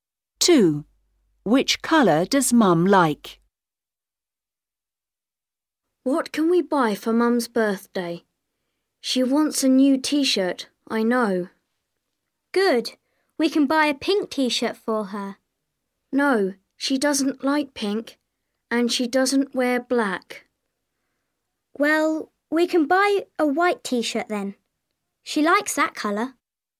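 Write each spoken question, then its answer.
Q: Which colour does Mum like?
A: White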